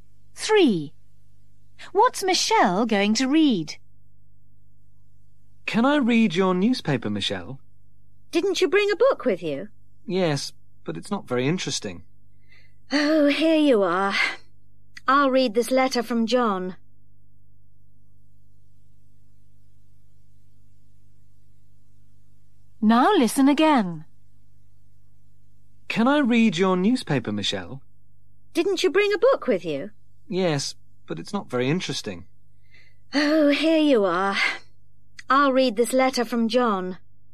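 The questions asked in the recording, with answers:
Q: What's Michelle going to read?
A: a letter from John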